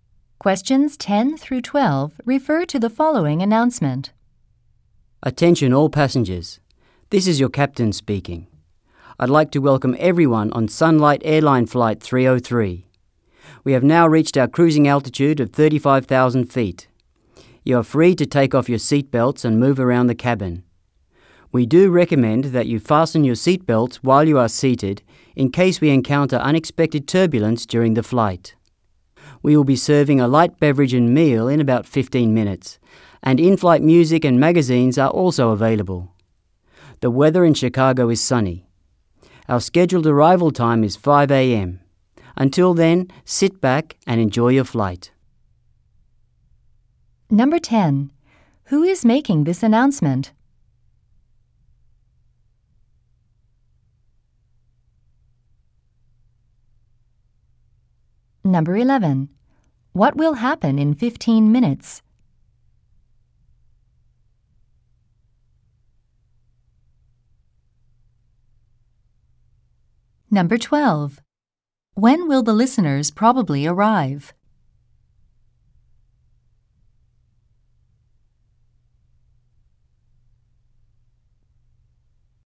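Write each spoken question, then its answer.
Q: Who is making this announcement?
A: The captain (pilot)

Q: What will happen in 15 minutes?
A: A light beverage and meal will be served

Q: When will the listeners probably arrive?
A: At 5 a.m.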